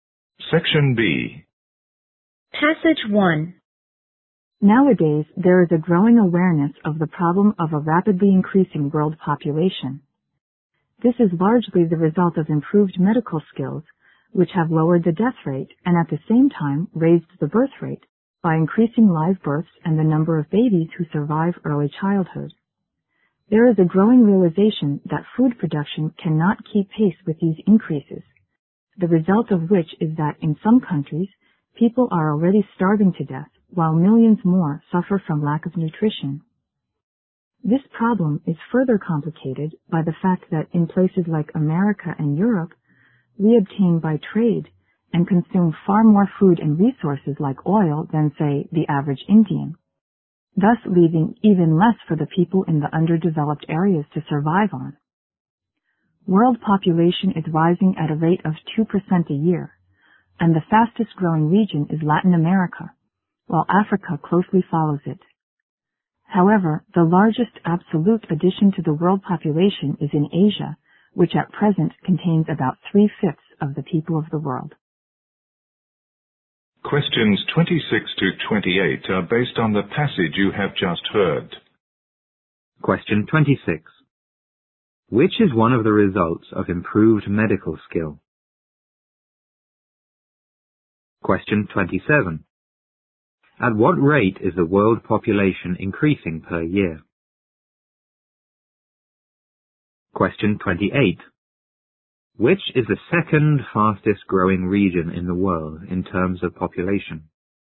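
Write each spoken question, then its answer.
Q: Which is one of the results of improved medical skill?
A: A lower death rate

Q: Which is the second fastest growing region in the world in terms of population?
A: Africa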